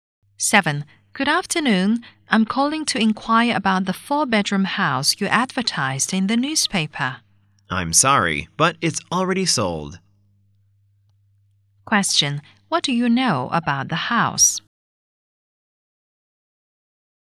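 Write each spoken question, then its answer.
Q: Question, what do you know about the house?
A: It has already been sold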